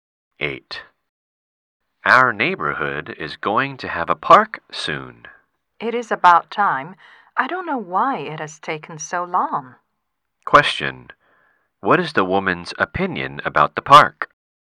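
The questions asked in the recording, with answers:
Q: what is the woman's opinion about the park?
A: It should have been built long ago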